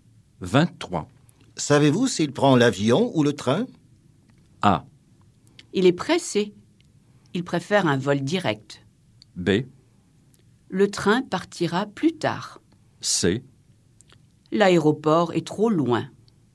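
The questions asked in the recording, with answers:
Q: Savez-vous s'il prend l'avion ou le train?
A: A: Il est pressé. Il préfère un vol direct.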